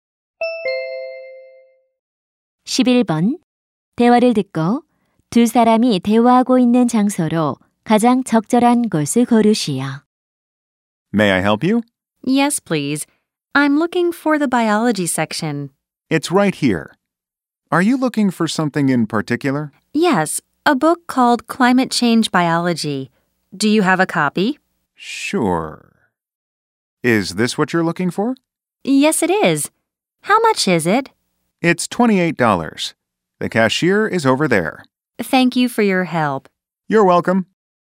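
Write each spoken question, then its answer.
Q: 대화를 듣고 두 사람이 대화하고 있는 장소로 가장 적절한 곳을 고르시오.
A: 서점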